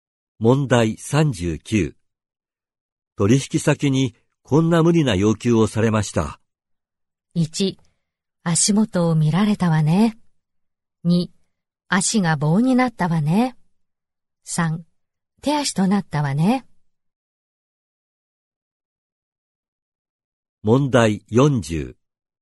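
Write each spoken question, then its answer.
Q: 取引先にこんな無理な要求をされました。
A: 1: 足元を見られたわね。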